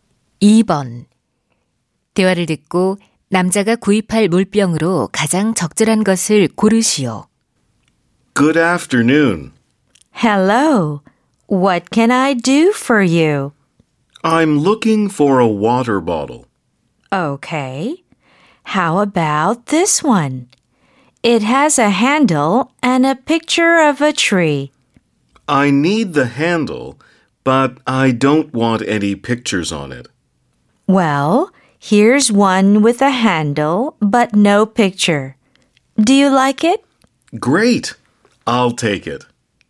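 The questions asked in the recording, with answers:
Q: 대화를 듣고 남자가 구입할 물병으로 가장 적절한 것을 고르시오.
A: 손잡이가 있고 그림이 없는 물병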